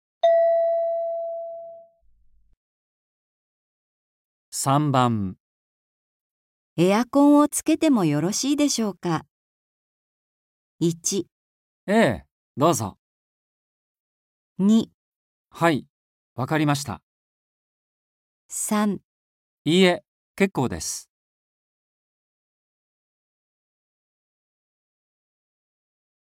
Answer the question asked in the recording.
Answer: 1

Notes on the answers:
F: エアコンを つけても よろしいでしょうか。 M: 1.ええ、どうぞ。 2. はい、わかりました。 3. いいえ、けっこうです。

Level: N4